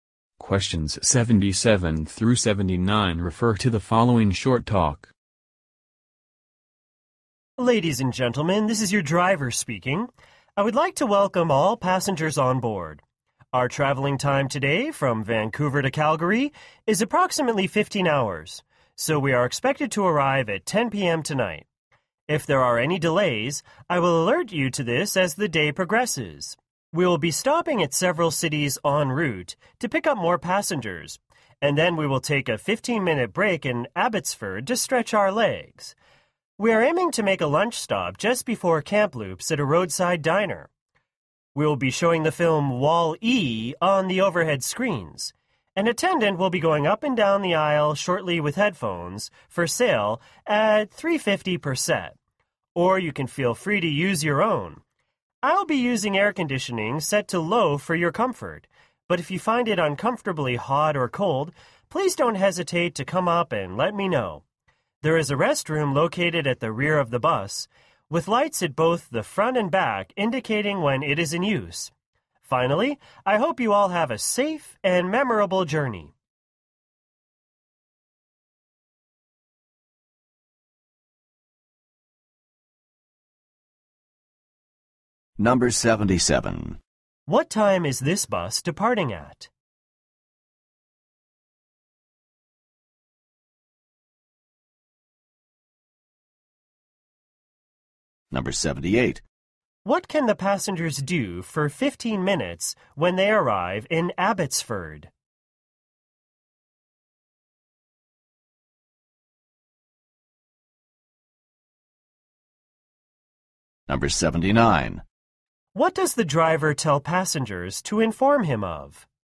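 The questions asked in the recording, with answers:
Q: What time is this bus departing at?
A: 7 a.m.

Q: What can the passengers do for 15 minutes when they arrive in Abbotsford?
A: Stretch their legs

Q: What does the driver tell passengers to inform him of?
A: If they find it too hot or too cold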